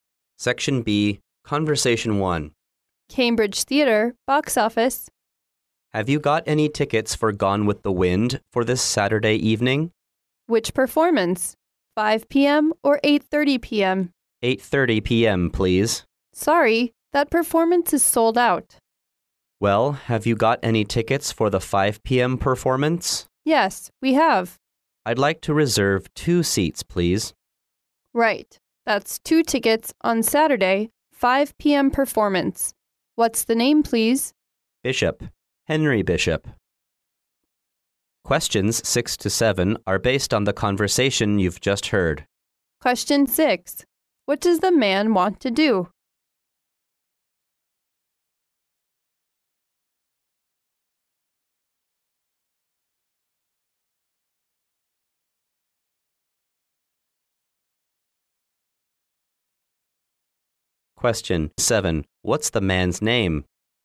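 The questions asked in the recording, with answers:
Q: What does the man want to do?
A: Reserve two tickets for Gone with the Wind on Saturday

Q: What's the man's name?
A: Henry Bishop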